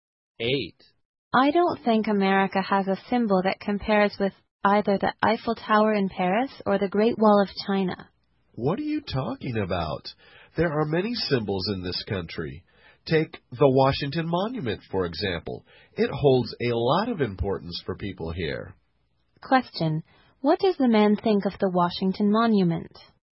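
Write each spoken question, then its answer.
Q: What does the man think of the Washington Monument?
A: It is an important symbol for Americans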